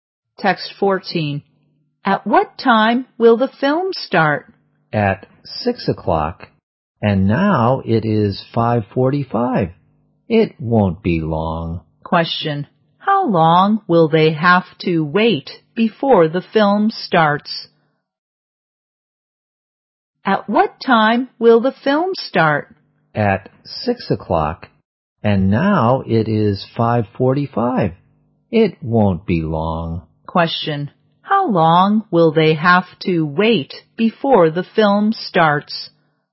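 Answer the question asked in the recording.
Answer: 15 minutes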